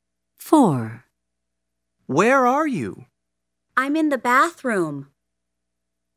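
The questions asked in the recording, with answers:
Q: Where are you?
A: In the bathroom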